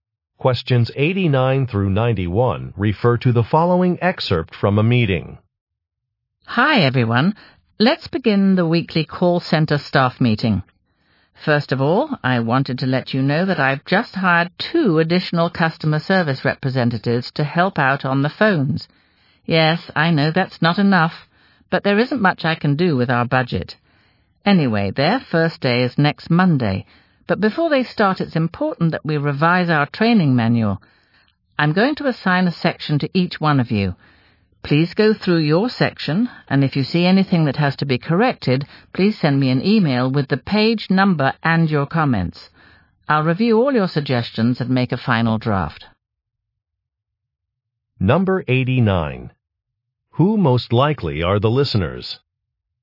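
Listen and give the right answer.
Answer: Call center staff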